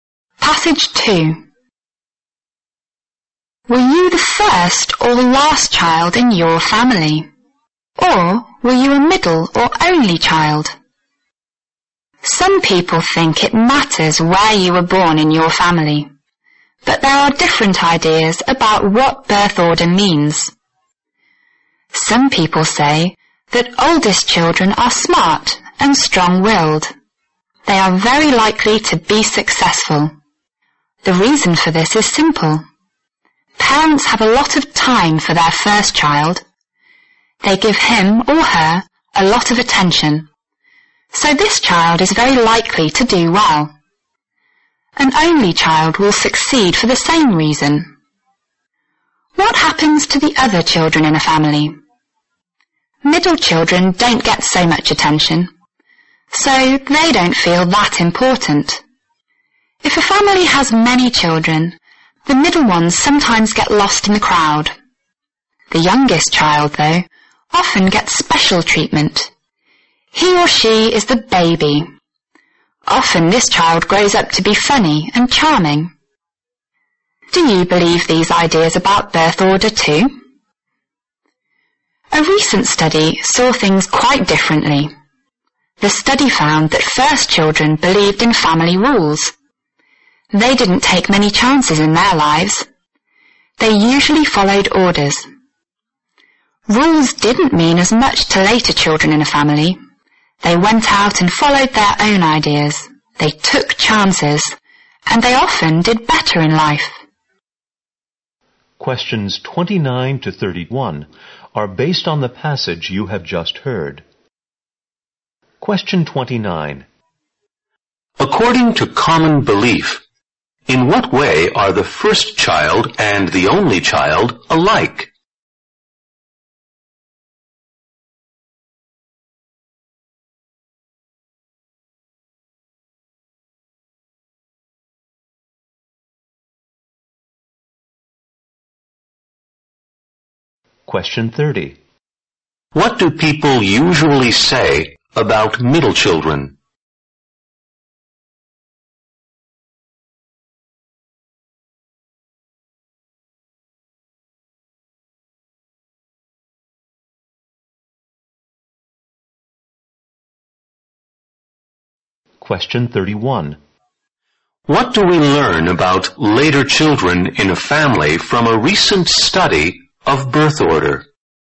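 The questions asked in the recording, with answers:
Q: According to common belief, in what way are the first child and the only child alike?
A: They get a lot of attention and are likely to succeed

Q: What do people usually say about middle children?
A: They get less attention and don't feel important

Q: What do we learn about later children in a family from a recent study of birth order?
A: They follow their own ideas, take chances and often do better in life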